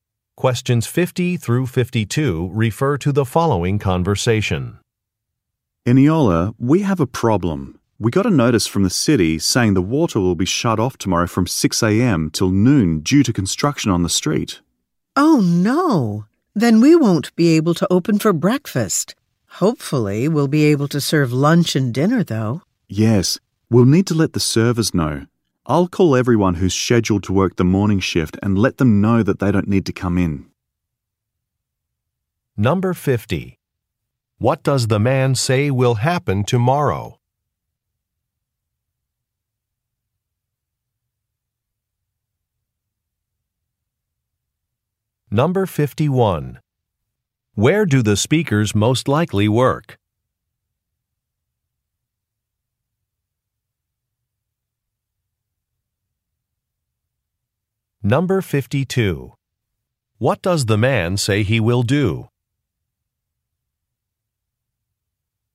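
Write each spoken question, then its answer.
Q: What does the man say will happen tomorrow?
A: The water will be shut off

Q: Where do the speakers most likely work?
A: At a restaurant

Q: What does the man say he will do?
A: Call the morning shift workers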